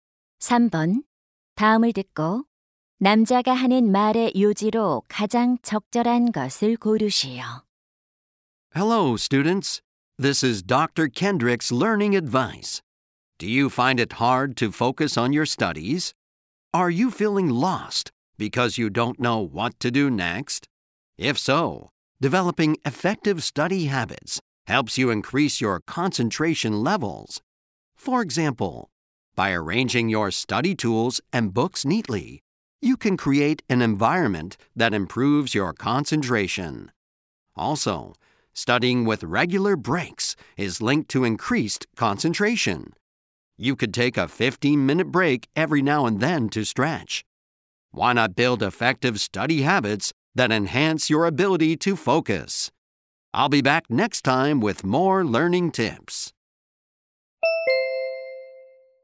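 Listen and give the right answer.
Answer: 효과적인 학습 습관은 집중력을 높여 준다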